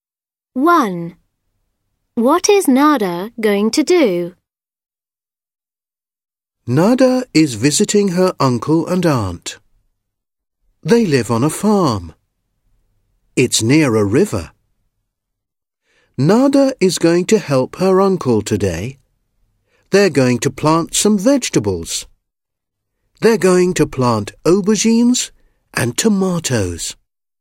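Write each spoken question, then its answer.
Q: What is Nada going to do?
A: Help her uncle plant vegetables (aubergines and tomatoes)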